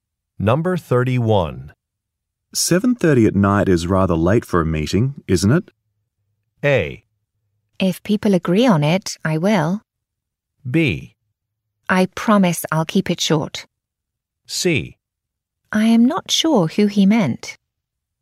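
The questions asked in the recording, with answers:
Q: 7:30 at night is rather late for a meeting, isn't it?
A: B: I promise I'll keep it short.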